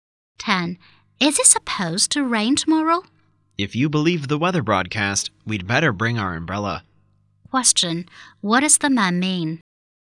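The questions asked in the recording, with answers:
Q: What does the man mean?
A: It will probably rain tomorrow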